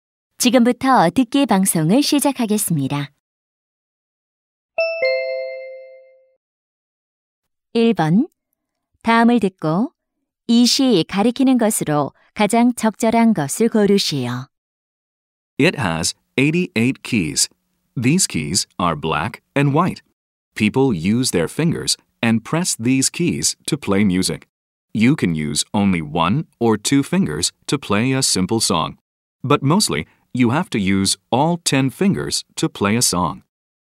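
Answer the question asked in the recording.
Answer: 피아노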